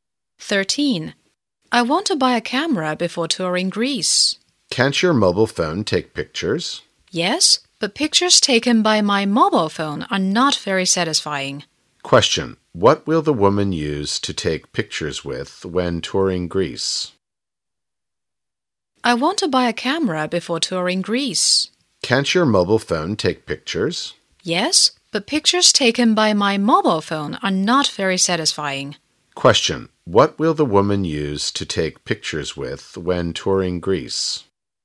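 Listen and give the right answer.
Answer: A camera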